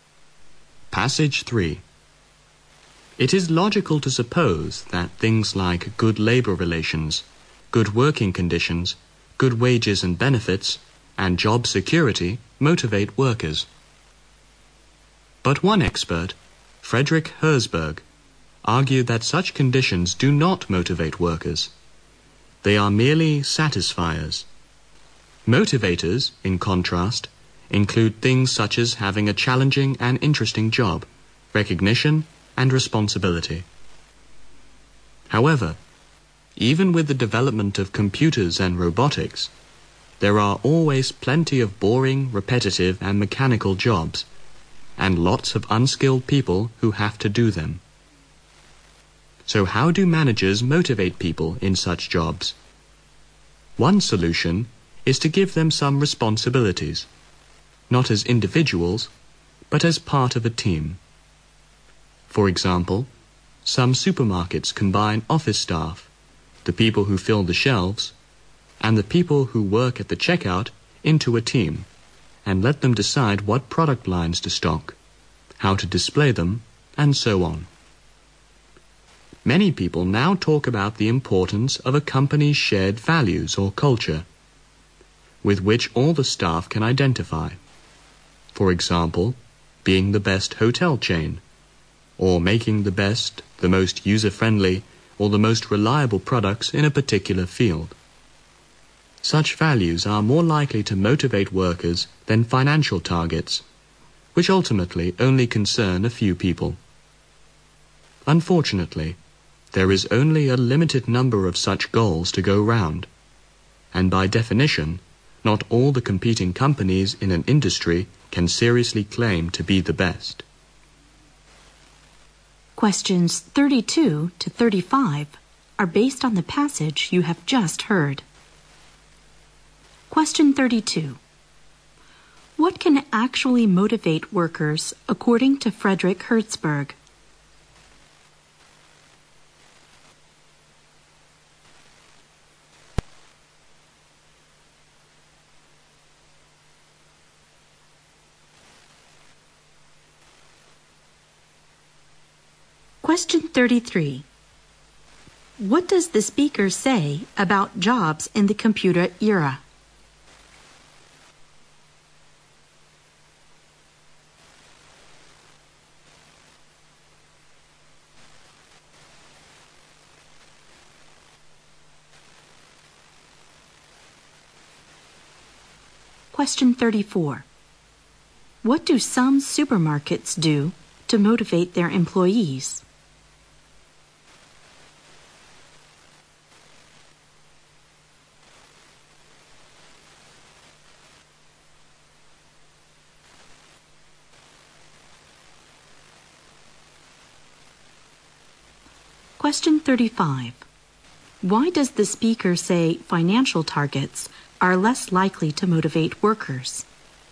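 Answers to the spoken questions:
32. A challenging and interesting job, recognition and responsibility
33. There are still plenty of boring, repetitive, mechanical jobs
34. Give them responsibilities as part of a team
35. They ultimately only concern a few people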